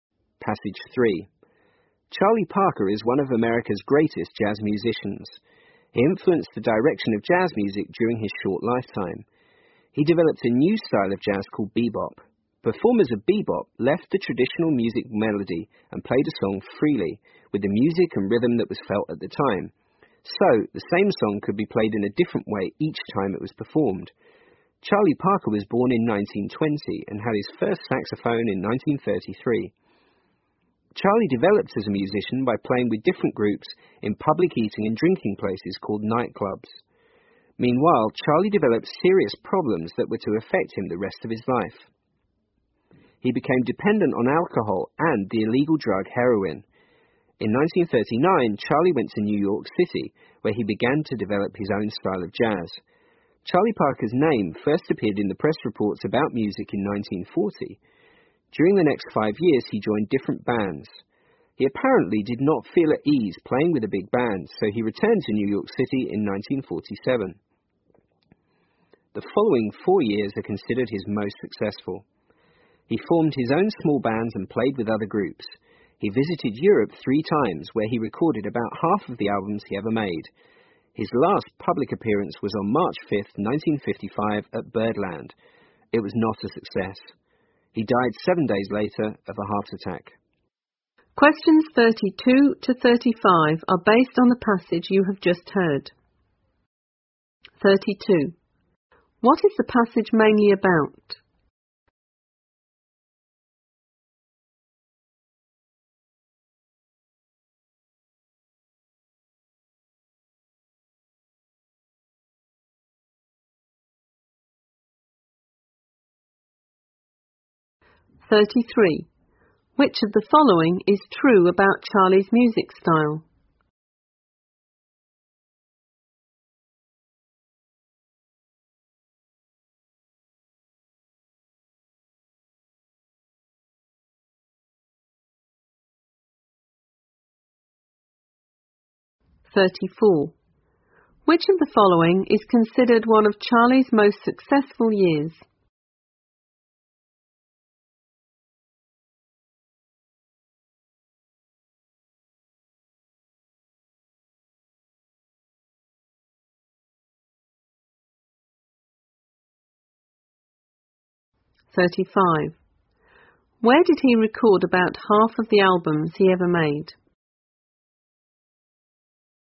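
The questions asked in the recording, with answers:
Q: What is the passage mainly about?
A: The life and music career of jazz musician Charlie Parker

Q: Where did he record about half of the albums he ever made?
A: In Europe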